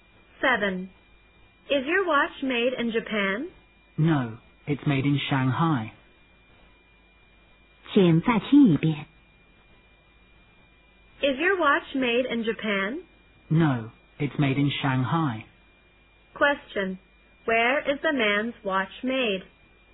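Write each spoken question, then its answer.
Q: Where is the man's watch made?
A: In Shanghai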